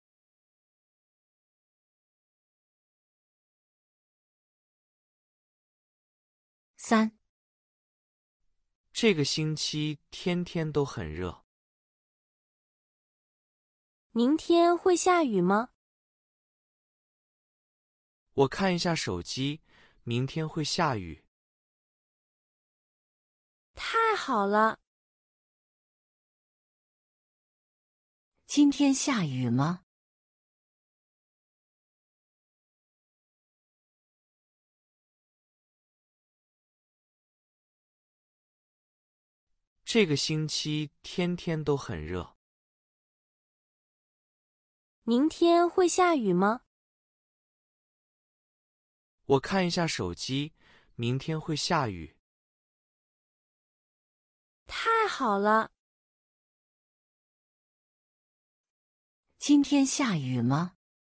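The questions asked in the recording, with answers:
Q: 今天下雨吗?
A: 不下雨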